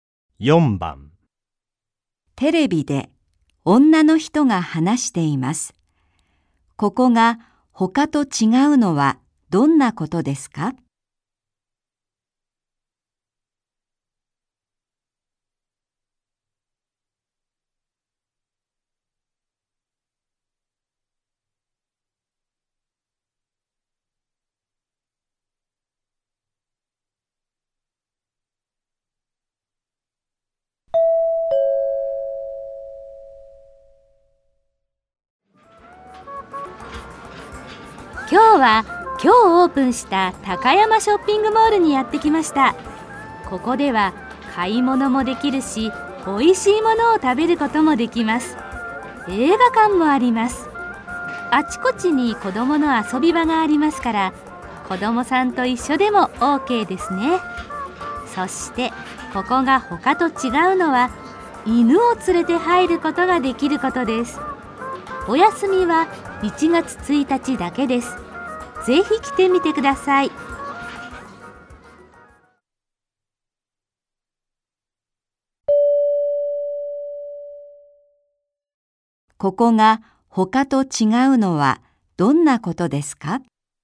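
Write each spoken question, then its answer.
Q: ここが他と違うのはどんなことですか?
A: 犬を連れて入ることができること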